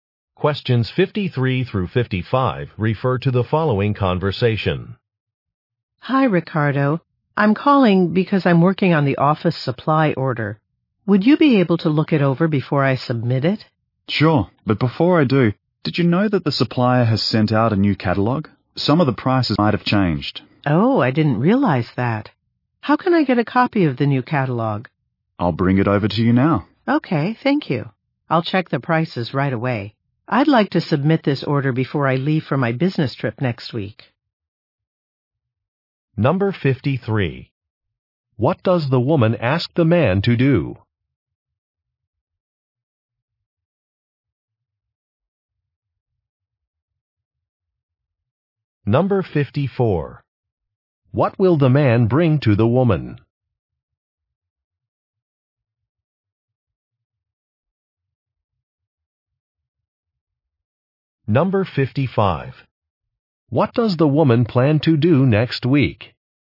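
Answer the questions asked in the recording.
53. Look over a supply order
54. A new catalog
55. Go on a business trip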